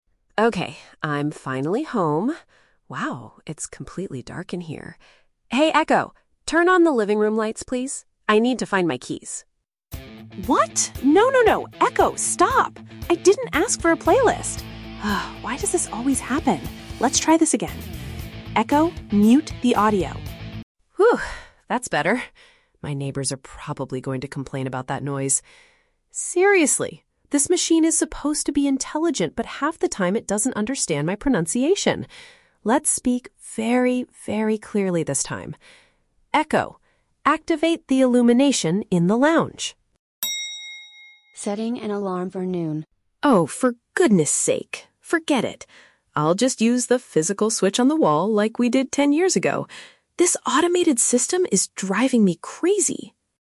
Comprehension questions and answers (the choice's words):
Listen to a person talking to a smart speaker and choose the correct answer (A, B, or C) for each question.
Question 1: Why is the person annoyed at the beginning of the recording?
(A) The machine could not find his misplaced house keys.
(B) The device played loud songs instead of brightening the room.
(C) The smart speaker could not connect to the home internet network.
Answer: The device played loud songs instead of brightening the room.

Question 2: What is the speaker worried about when the device makes a mistake?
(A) It might cause the people living next door to get upset.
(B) It will permanently damage the audio quality of the speaker.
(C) It might wake up the baby sleeping in the upstairs bedroom.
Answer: It might cause the people living next door to get upset.

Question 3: How does the user decide to solve the problem at the end?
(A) He asks the assistant to set a reminder for the next day.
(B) He decides to return the smart machine to the electronic store.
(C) He chooses to operate the room's lighting manually by hand.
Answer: He chooses to operate the room's lighting manually by hand.

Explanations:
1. The user asks the machine to "turn on the living room lights" (brighten the room), but the device plays "upbeat rock music" (loud songs) instead. Why the trap is wrong: Option (A) is the trap. The user mentions that he needs to "find my keys," but he doesn't ask the machine to find them; he asks for the lights so he can see. Option (C) is a common tech issue, but internet connection is never mentioned.
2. The user states, "My neighbors are probably going to complain." "People living next door" is a paraphrase for neighbors, and "get upset/complain" means they are annoyed. Why the trap is wrong: Option (B) is the trap. The user commands the machine to "mute the audio" (stop the music), but he is not worried about damaging the audio quality. Option (C) is a plausible distraction, but there is no mention of a baby in the house.
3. Out of frustration, the user says, "I'll just use the physical switch on the wall." Pressing a physical switch is operating it manually by hand. Why the trap is wrong: Option (A) is the trap. The smart speaker incorrectly says, "Setting an alarm for noon" (a reminder), but the user did not ask for this and tells it to "forget it." Option (B) is a plausible reaction when a device doesn't work, but he doesn't say he will return it.

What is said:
User: Okay, I'm finally home. Wow, it's completely dark in here. Hey Echo... turn on the living room lights, please. I need to find my keys.
User: What? No, no, no! Echo, stop! I didn't ask for a playlist! Ugh, why does this always happen? Let's try this again. Echo, mute the audio!
User: Phew, that's better. My neighbors are probably going to complain about that noise. Seriously, this machine is supposed to be intelligent, but half the time it doesn't understand my pronunciation. Let's speak very, very clearly this time. Echo... activate the illumination in the lounge!
User: Oh, for goodness sake! Forget it. I'll just use the physical switch on the wall like we did ten years ago. This automated system is driving me crazy!